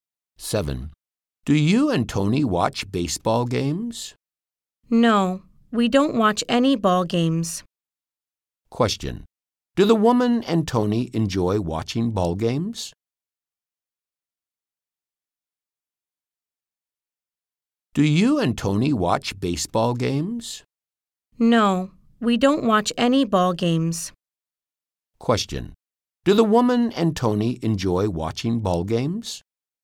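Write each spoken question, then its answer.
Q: Question. Do the woman and Tony enjoy watching ball games?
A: No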